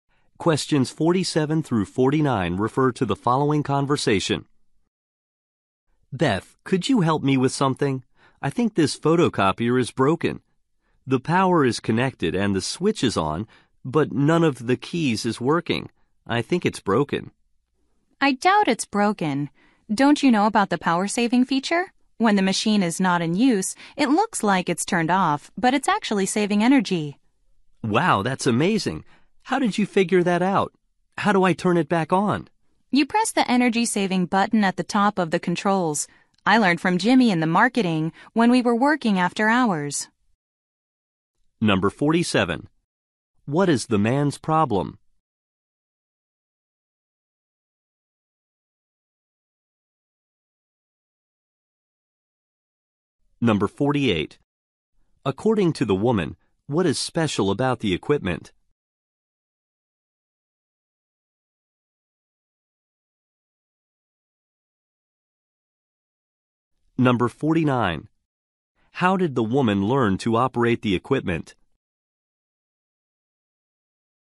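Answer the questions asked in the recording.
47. The photocopier's keys aren't working
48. It has a power-saving feature
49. From Jimmy in marketing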